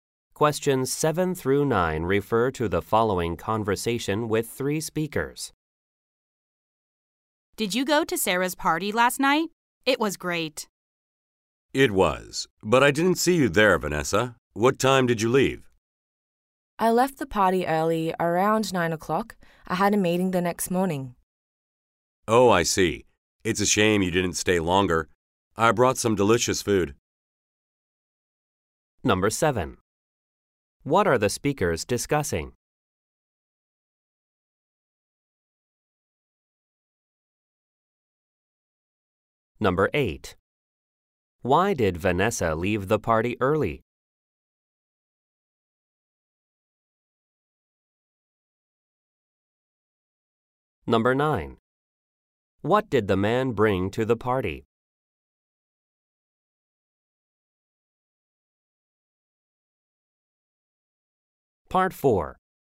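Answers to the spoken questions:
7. Sarah's party last night.
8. She had a meeting the next morning.
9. Some delicious food.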